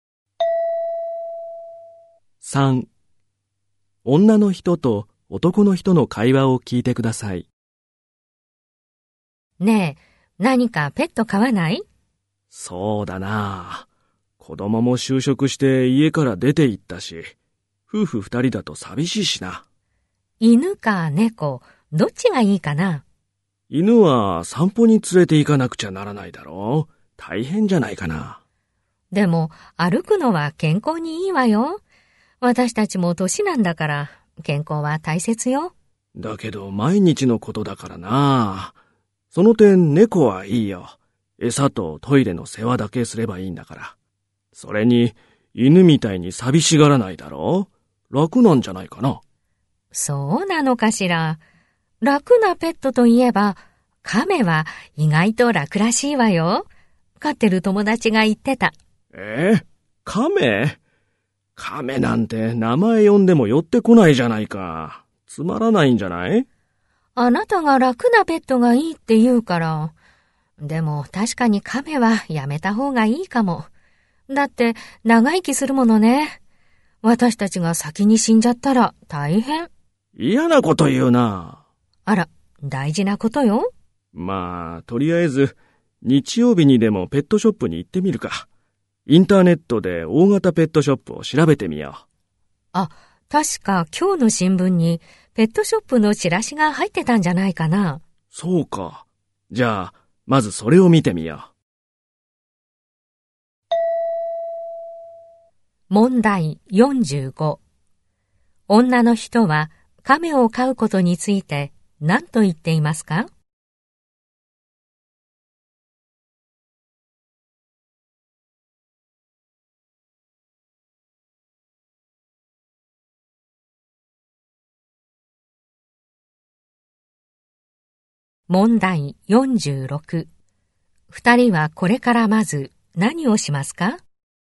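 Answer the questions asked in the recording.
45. 長生きするのでやめた方がいい
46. 新聞のペットショップのチラシを見る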